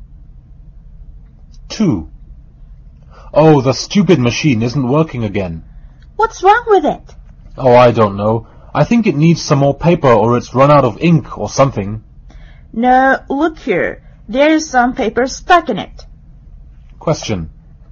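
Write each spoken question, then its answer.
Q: What's wrong with the printer?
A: There's paper stuck in it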